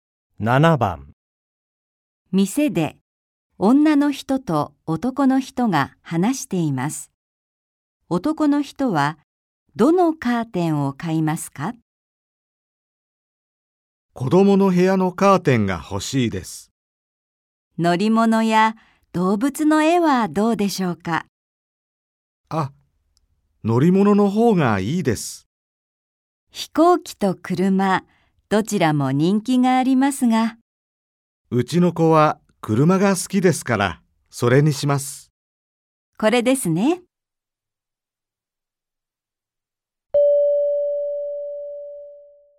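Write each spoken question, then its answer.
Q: 男の人はどのカーテンを買いますか?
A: 車の絵のカーテン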